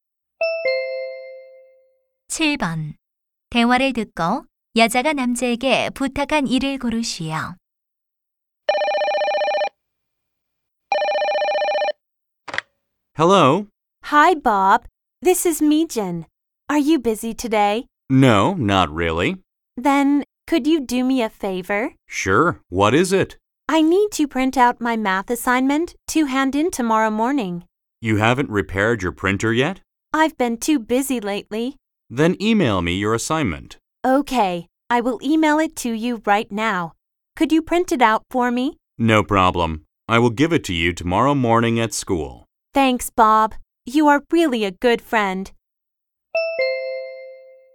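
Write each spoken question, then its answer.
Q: 대화를 듣고 여자가 남자에게 부탁한 일을 고르시오.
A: 수학 과제 출력해 주기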